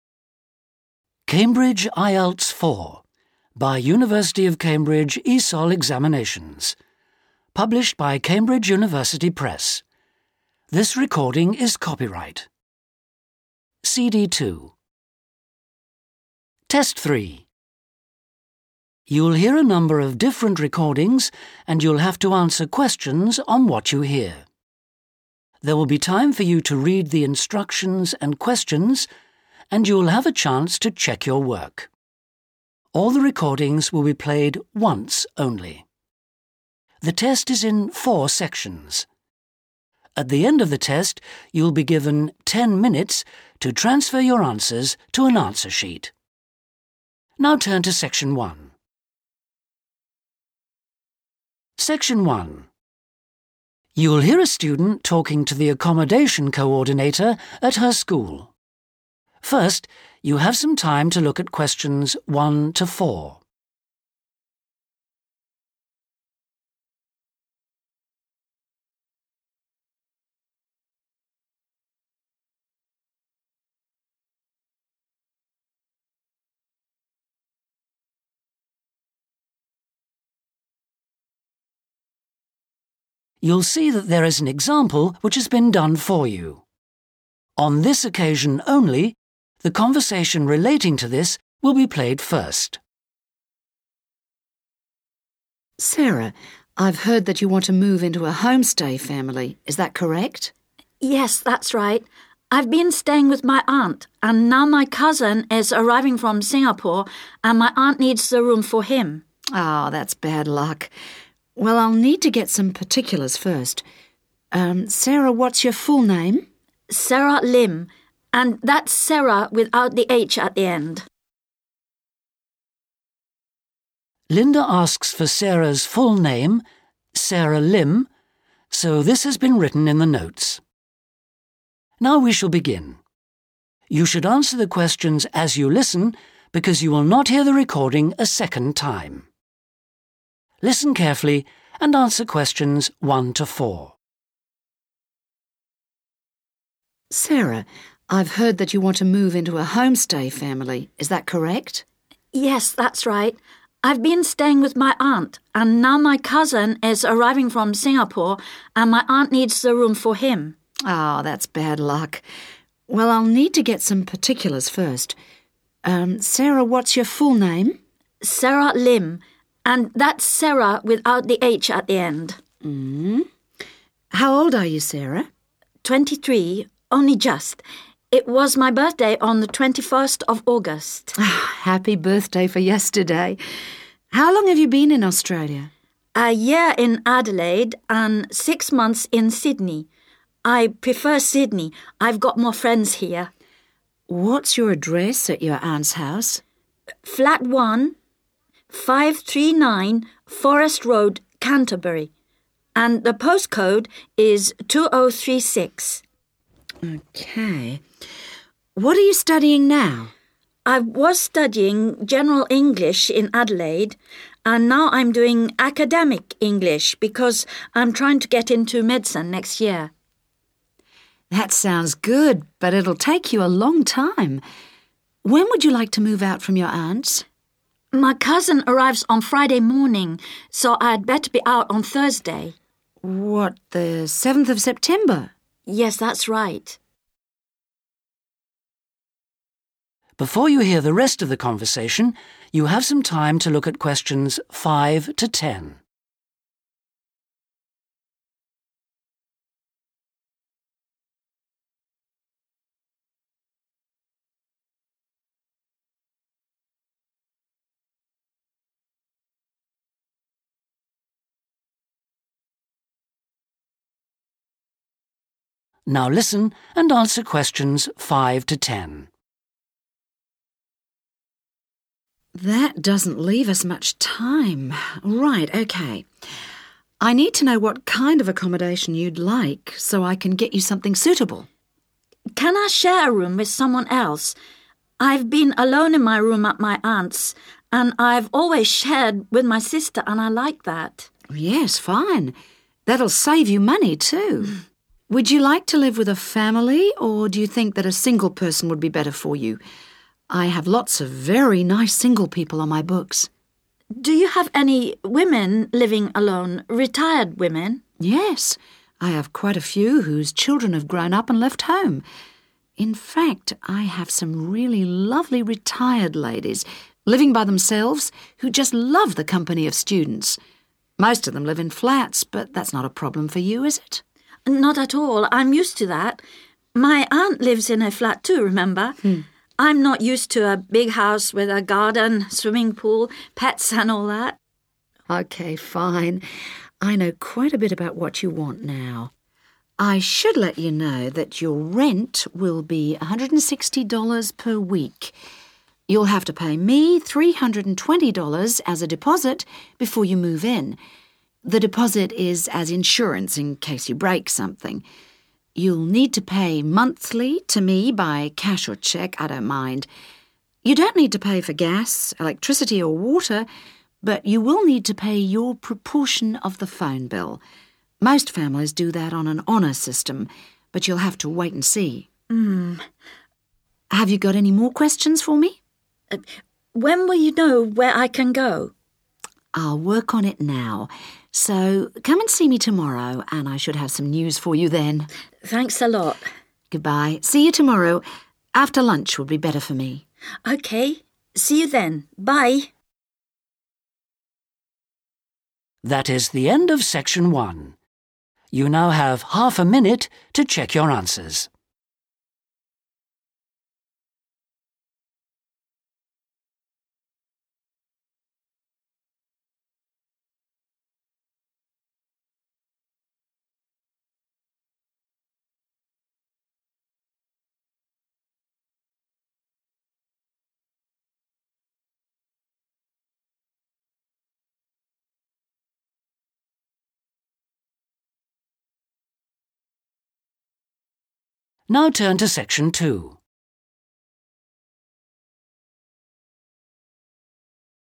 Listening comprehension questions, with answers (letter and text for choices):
Complete the form below. Write NO MORE THAN THREE WORDS AND/OR NUMBERS for each answer.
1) Length of time in Australia: _____ and a half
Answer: 1 year / one year / a year

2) Flat 1, 539, _____ Road, Canterbury 2036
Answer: Forest / Forrest

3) Present course: _____ English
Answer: Academic

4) _____ , 7th September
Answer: Thursday

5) Sara requires a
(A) single room.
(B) twin room.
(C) triple room.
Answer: (B) twin room.

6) She would prefer to live with a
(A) family.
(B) single person.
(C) couple.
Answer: (B) single person.

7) She would like to live in a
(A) flat.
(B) house.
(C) studio apartment.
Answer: (A) flat.

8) The _____ will be $320.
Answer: deposit

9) She needs to pay the rent by cash or cheque on a _____ basis.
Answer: monthly

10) She needs to pay her part of the _____ bill.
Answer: telephone / phone

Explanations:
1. The correct answer is '1 year' because the transcript says Sara spent 'a year in Adelaide and six months in Sydney.' Since 'six months' is the same as 'half a year,' and the form already has the words 'and a half,' you only need to write '1 year' or 'one year' to make the total time correct.
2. The correct answer is 'Forest' because Sara says this when she gives her address to Lynda. In the transcript, she tells Lynda that she lives on 'Forest Road'. The form asks for the name of the road before the word 'Road'.
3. The correct answer is 'Academic' because Sara explains she is currently studying 'Academic English' to prepare for medical school next year. Sara mentions that while she was studying 'General English' in another city (Adelaide) in the past, her present course in Sydney is different. Keywords to look for are 'now I'm doing', which indicates her current situation.
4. The correct answer is Thursday because Sara explains that her cousin is coming to stay at her current place on Friday. Because of this, she needs to leave and start her new housing one day before, which is Thursday. Lynda confirms that this Thursday is the seventh of September, which matches the information on the form.
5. The correct answer is B because Sara specifically asks if she can share her room with another person. She explains that she has been alone in her current room and prefers sharing because she used to share with her sister. A room meant for two people is called a twin room, which matches Sara's request to not be alone.
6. The correct answer is B because when Lynda asks Sara if she wants to live with a family or a single person, Sara specifically asks for women living alone. A person who is living alone is the same as a single person.
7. The correct answer is 'A' because Sara agrees when Lynda mentions that many of the available hosts live in flats. Sara says she is 'used to that' because her aunt also lives in a flat. She specifically says she is 'not used to' a 'big house,' which means a house is not what she wants.
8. The correct answer is "deposit" because Lynda tells Sara that she needs to pay three hundred and twenty dollars ($320) before moving into the homestay. This money is called a deposit and serves as "insurance" for any damage that might happen while Sara lives there.
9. The correct answer is "monthly" because Lynda explains the payment schedule to Sara. She says that Sara needs to make her payments every month. The sentence in the task uses the phrase "on a monthly basis," which is the same as saying "pay monthly." Lynda also mentions using "cash or cheque," which matches the sentence in the task.
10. The correct answer is found in the section where Lynda explains the bills. She tells Sara that while things like water and gas are free, Sara must pay her own share of the bill for using the phone. The word 'proportion' in the text means 'part' or 'share', matching the sentence in the task.